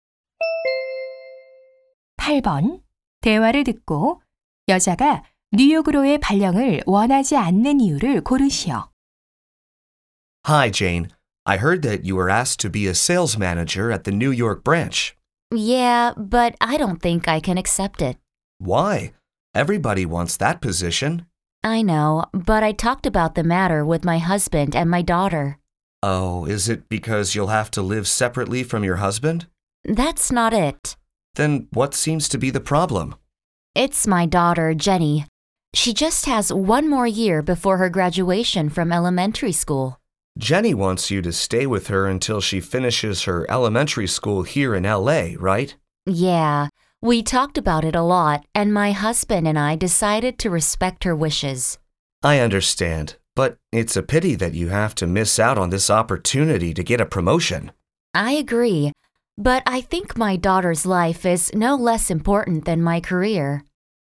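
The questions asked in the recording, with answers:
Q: 대화를 듣고 여자가 뉴욕으로의 발령을 원하지 않는 이유를 고르시오.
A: 딸이 LA에서 초등학교를 마칠 때까지 함께 있기를 원해서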